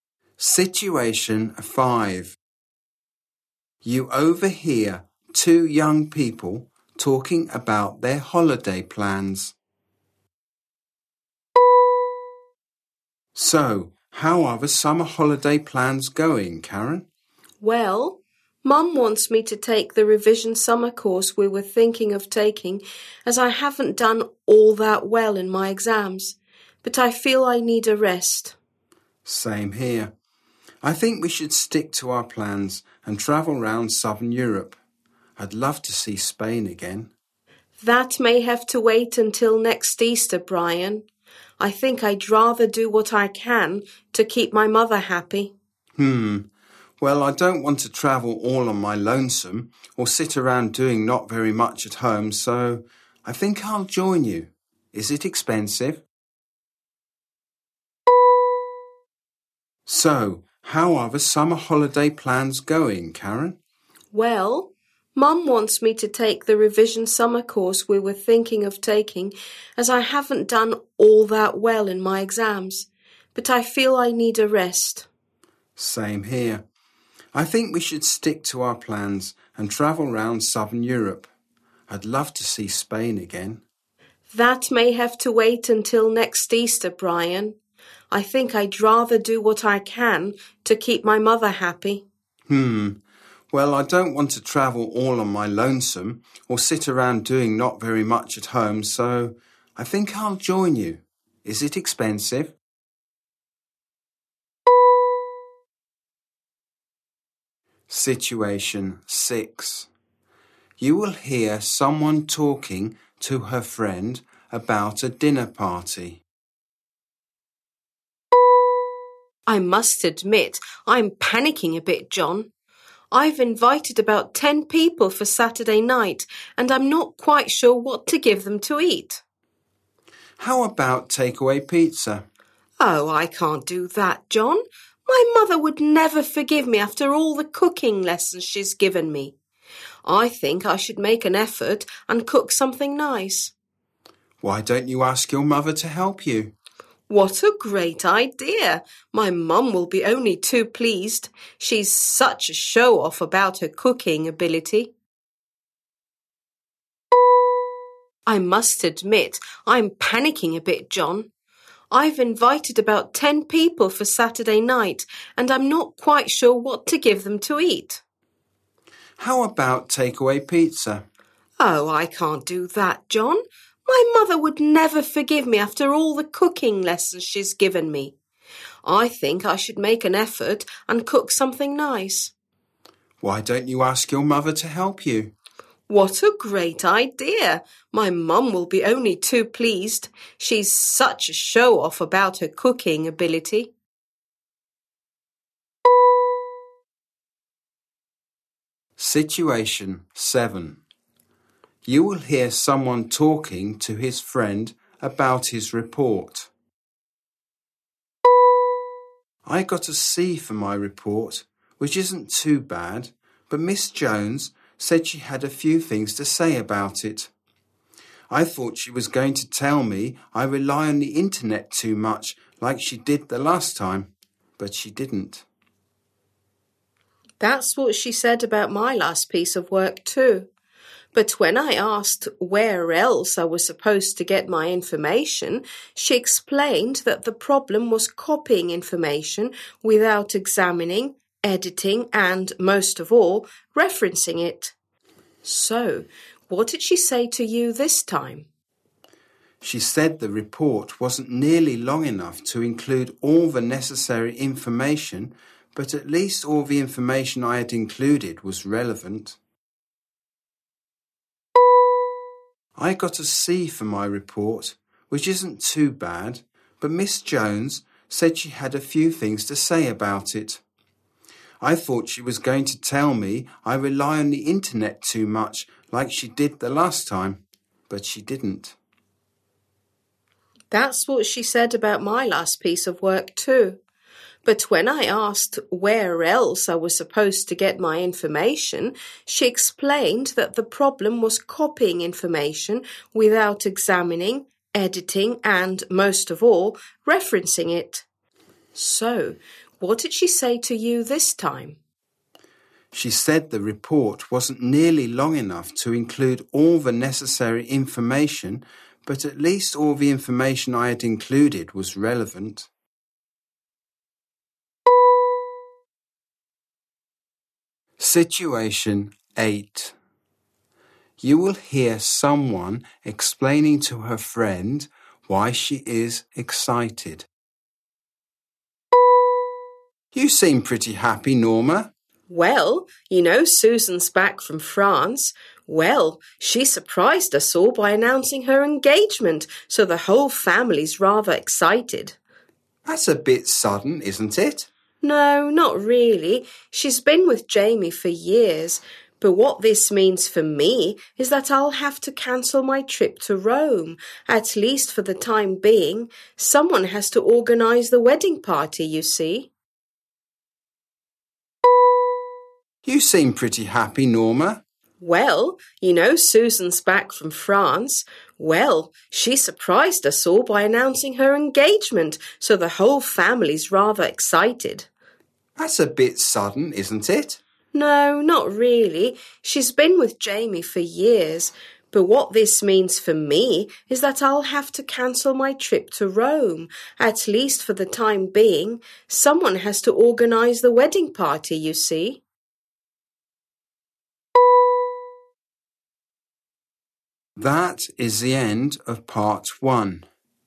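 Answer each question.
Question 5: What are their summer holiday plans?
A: To take the revision summer course together

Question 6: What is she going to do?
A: Ask her mother to help her cook

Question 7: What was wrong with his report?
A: It wasn't long enough

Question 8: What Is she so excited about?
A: Her sister Susan's engagement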